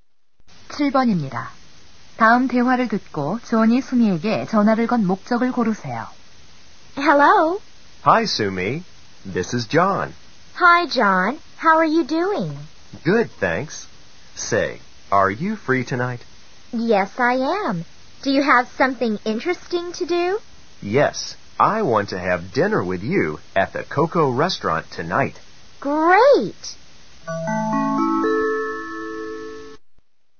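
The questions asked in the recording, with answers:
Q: 다음 대화를 듣고 존이 수미에게 전화를 건 목적을 고르세요.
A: 저녁 식사 초대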